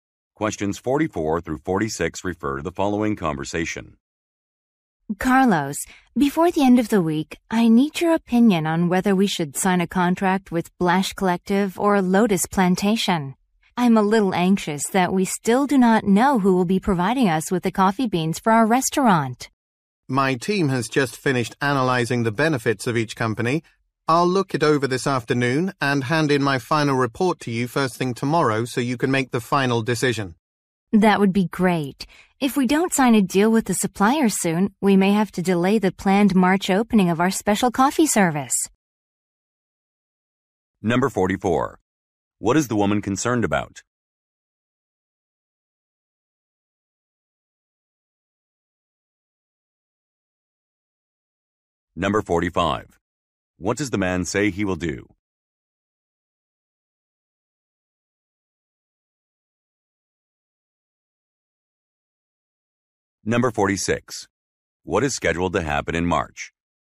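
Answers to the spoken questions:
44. They haven't chosen a coffee bean supplier
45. Review the analysis and submit a final report tomorrow morning
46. A special coffee service will launch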